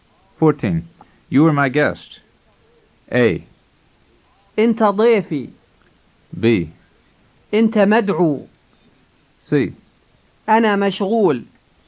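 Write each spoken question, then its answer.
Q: You are my guest.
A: A: أنت ضيفي.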